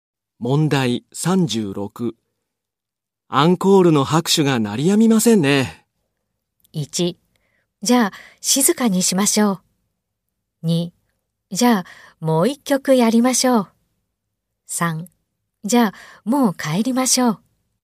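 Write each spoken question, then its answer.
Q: アンコールの拍手が鳴りやみませんね。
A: 2: じゃあ、もう一曲やりましょう。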